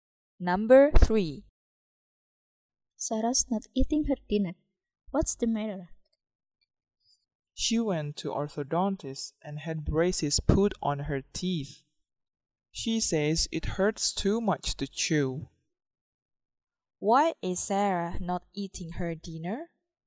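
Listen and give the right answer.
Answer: Her new braces make it hurt too much to chew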